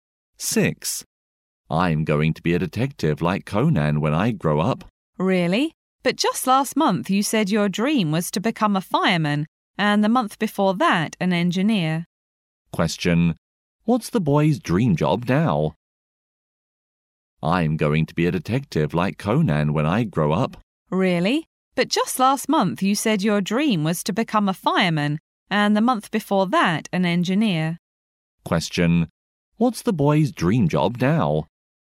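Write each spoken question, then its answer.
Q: What's the boy's dream job now?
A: A detective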